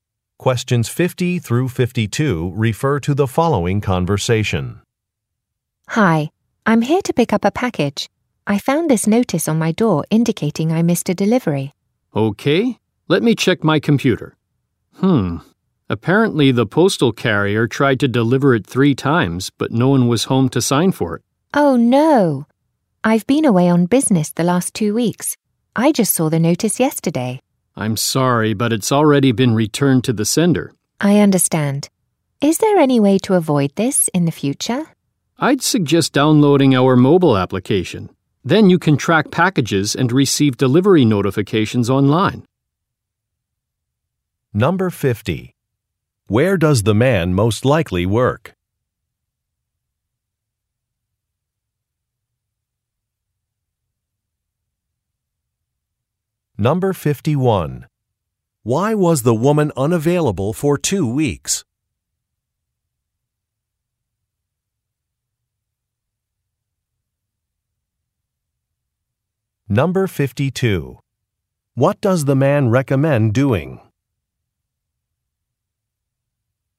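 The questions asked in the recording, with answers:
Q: Where does the man most likely work?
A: At a post office

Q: Why was the woman unavailable for 2 weeks?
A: She was away on business

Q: What does the man recommend doing?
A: Downloading a mobile application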